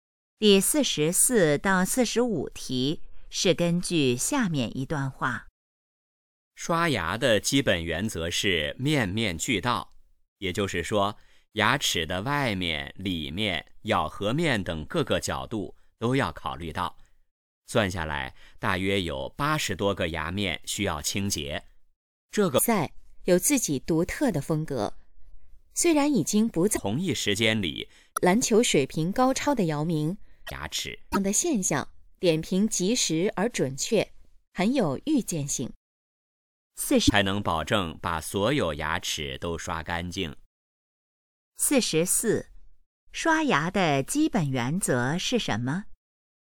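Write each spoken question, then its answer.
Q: 刷牙的基本原则是什么?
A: 面面俱到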